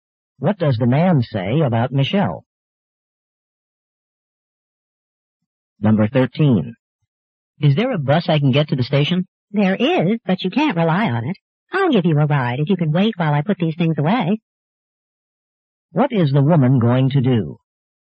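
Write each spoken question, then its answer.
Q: What is the woman going to do?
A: Give the man a ride to the station.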